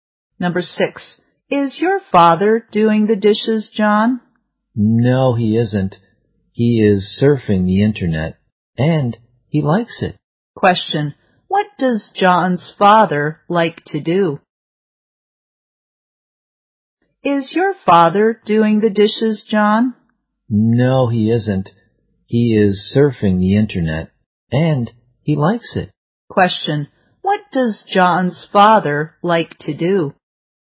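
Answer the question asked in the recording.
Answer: Surf the internet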